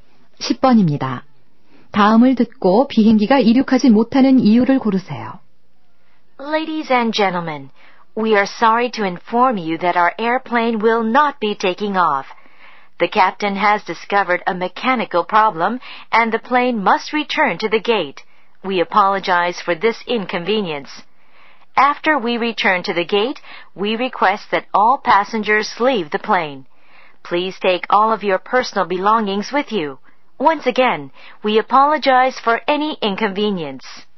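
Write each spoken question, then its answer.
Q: 다음을 듣고 비행기가 이륙하지 못하는 이유를 고르세요.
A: 기계 결함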